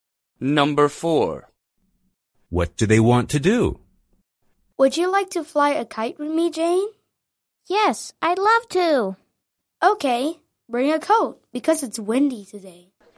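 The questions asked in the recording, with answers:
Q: What do they want to do?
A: fly a kite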